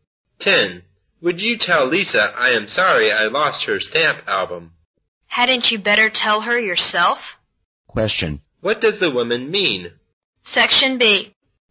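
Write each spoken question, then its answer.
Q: What does the woman mean?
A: The man should tell Lisa himself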